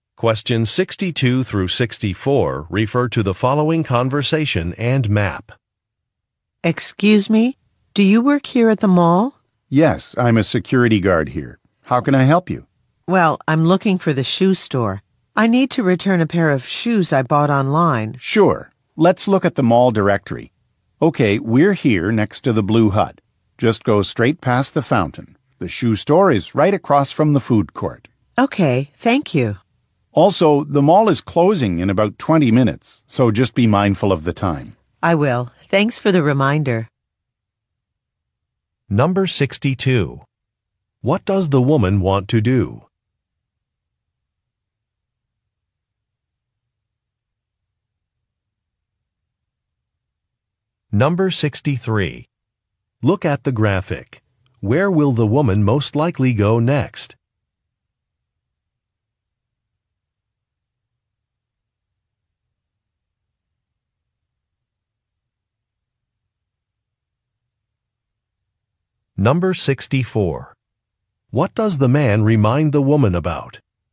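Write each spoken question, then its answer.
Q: What does the woman want to do?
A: Return a pair of shoes she bought online

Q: What does the man remind the woman about?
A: The mall is closing in about 20 minutes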